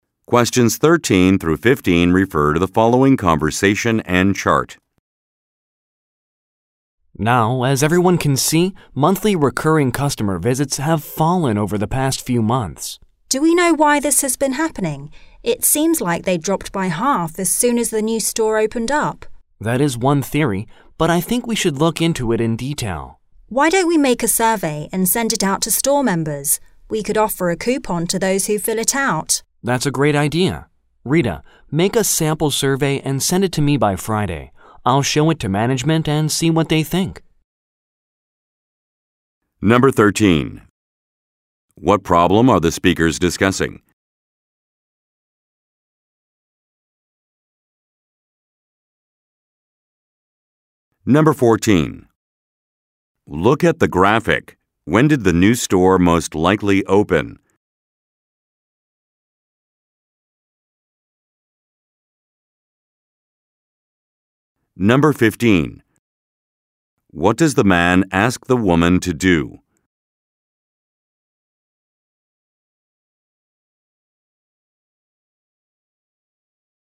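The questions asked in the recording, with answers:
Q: What problem are the speakers discussing?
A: Monthly recurring customer visits have fallen

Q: What does the man ask the woman to do?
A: Make a sample survey and send it to him by Friday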